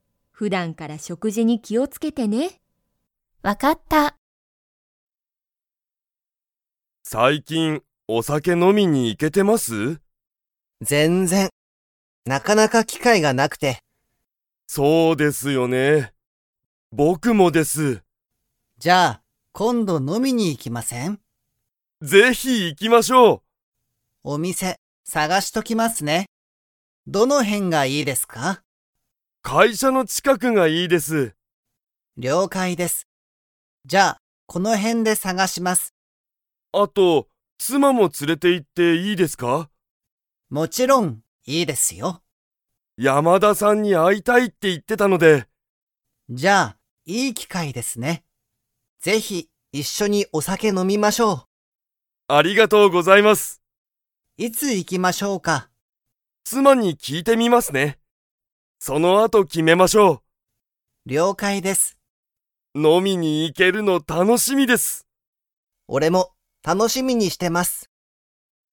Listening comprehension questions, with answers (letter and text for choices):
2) 佐藤さとうさんは も連つれて行いく。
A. 妻つま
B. 友達ともだち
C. 先生せんせい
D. 子供こども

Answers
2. A. 妻つま

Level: Level 3